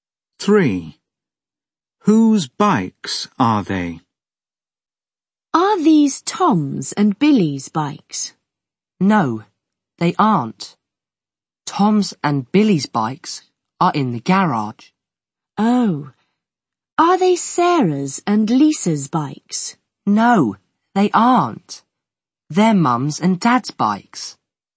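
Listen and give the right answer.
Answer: Mum's and Dad's bikes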